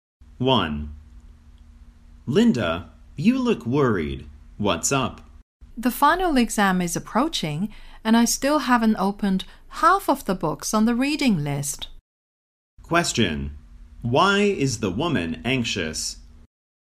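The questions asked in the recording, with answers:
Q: Why is the woman anxious?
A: She hasn't read half the books on the reading list before the final exam.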